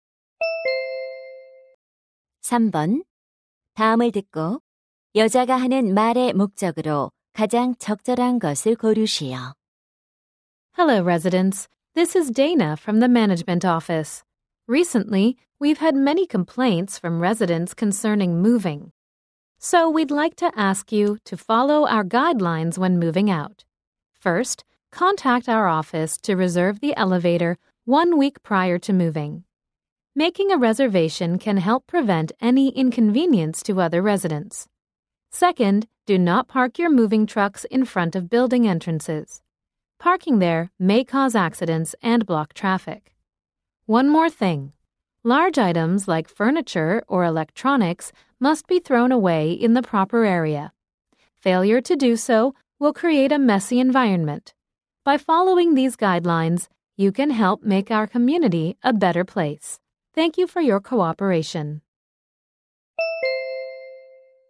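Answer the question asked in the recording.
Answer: 이사할 때 관리사무소 지침을 따를 것을 요청하려고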